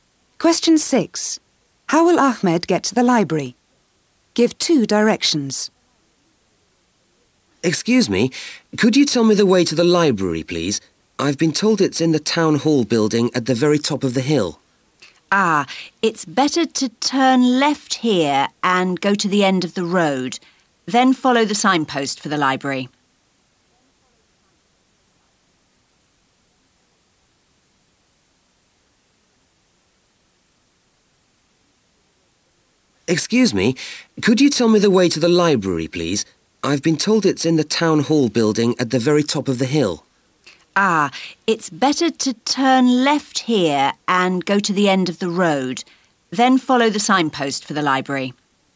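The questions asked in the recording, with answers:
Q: How will Ahmed get to the library?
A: Turn left, go to the end of the road, then follow the signpost for the library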